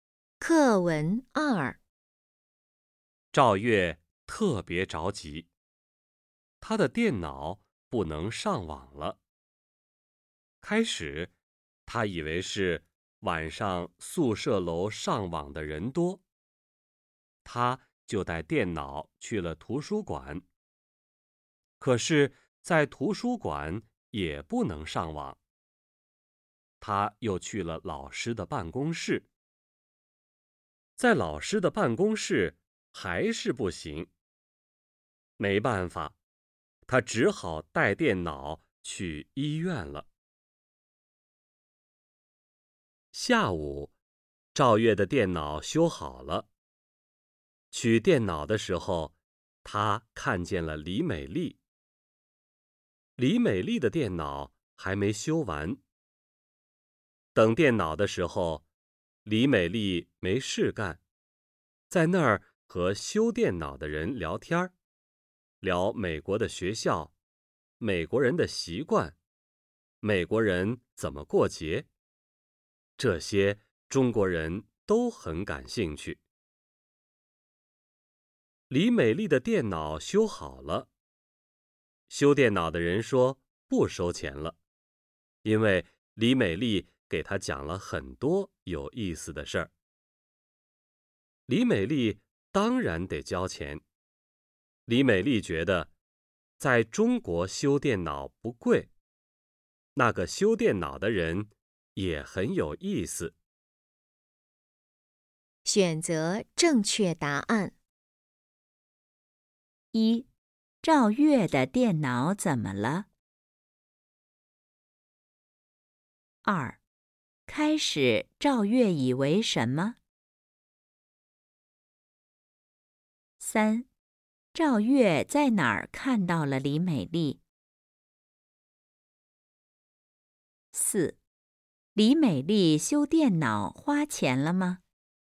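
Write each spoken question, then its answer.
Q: 赵月的电脑怎么了?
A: 不能上网了

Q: 开始赵月以为什么?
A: 晚上宿舍楼上网的人多

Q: 李美丽修电脑花钱了吗?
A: 花了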